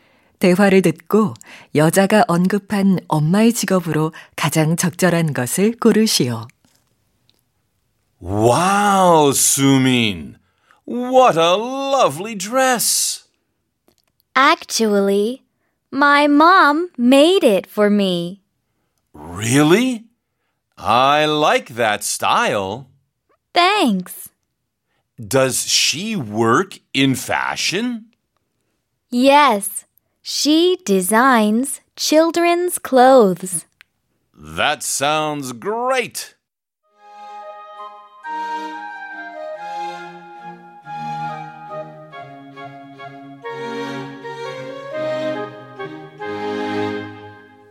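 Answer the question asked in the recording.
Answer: 아동복 디자이너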